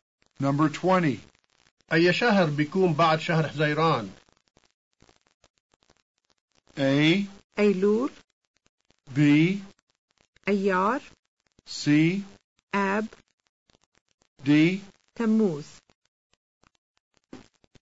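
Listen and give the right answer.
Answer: D: تموز.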